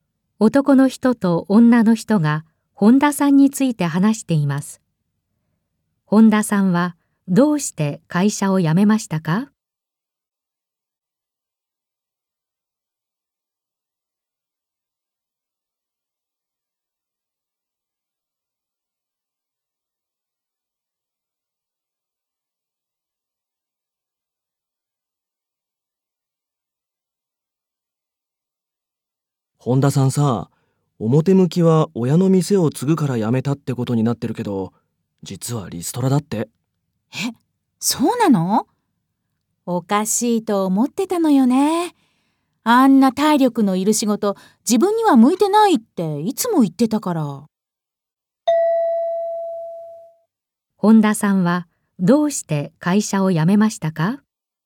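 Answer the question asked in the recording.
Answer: リストラされたから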